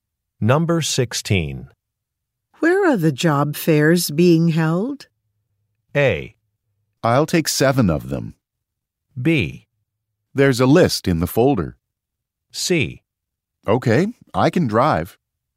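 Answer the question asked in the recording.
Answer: B: There's a list in the folder.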